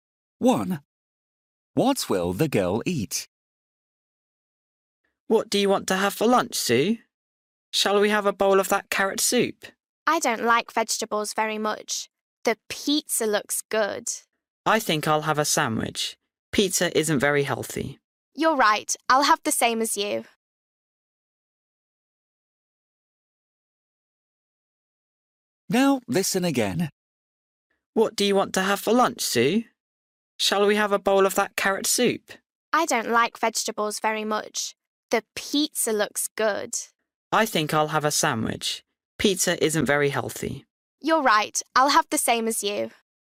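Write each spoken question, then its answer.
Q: What will the girl eat?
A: a sandwich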